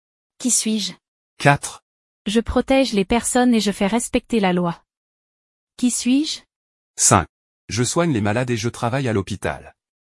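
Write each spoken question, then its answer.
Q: Qui suis-je?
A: policier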